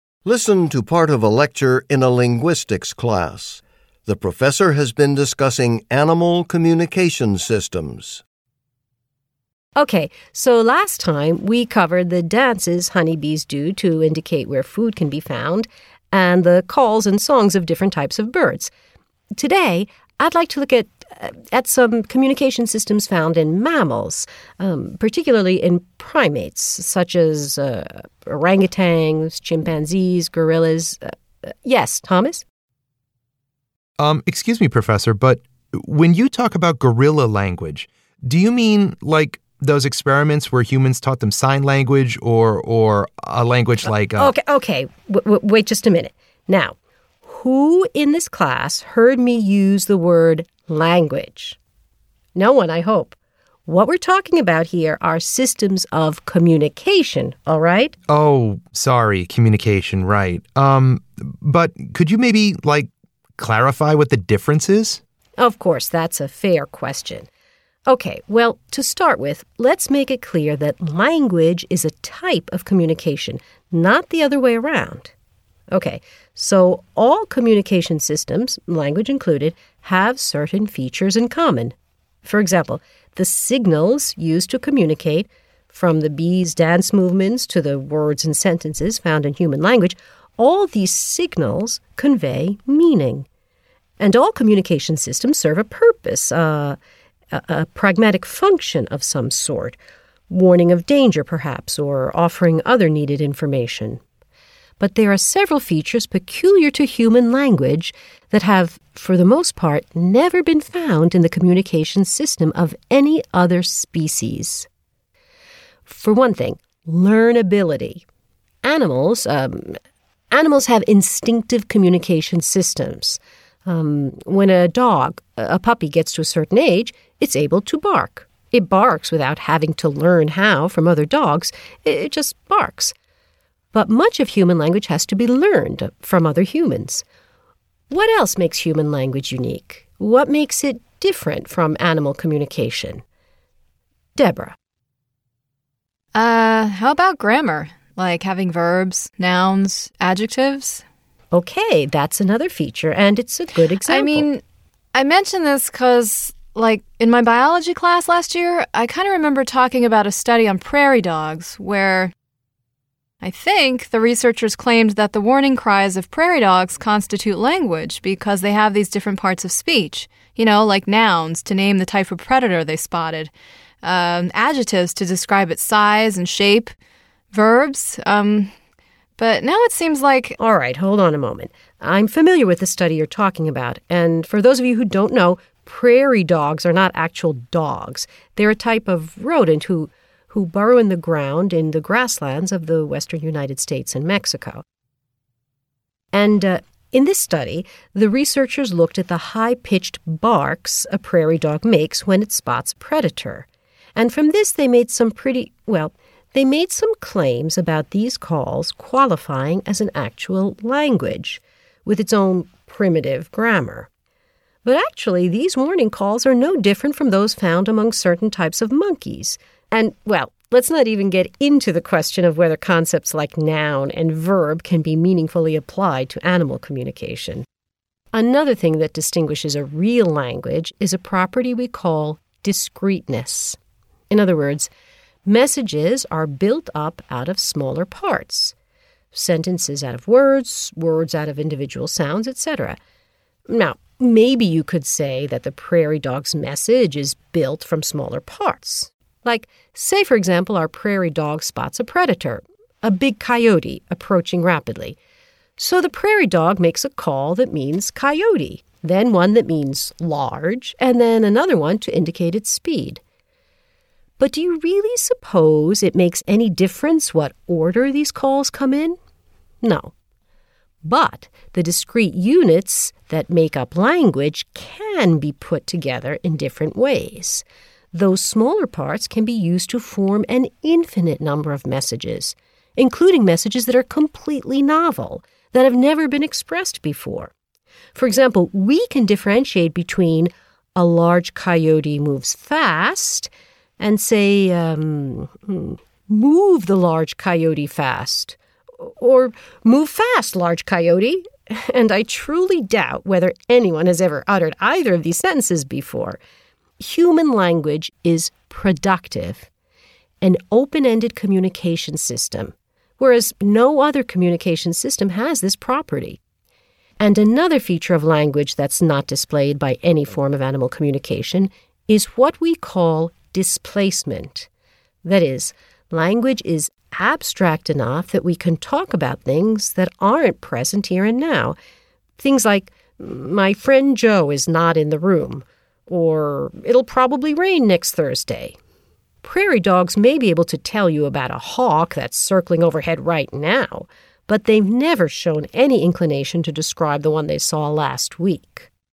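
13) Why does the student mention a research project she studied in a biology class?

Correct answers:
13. To give an example of a study claiming that prairie dog warning cries have grammar, like parts of speech.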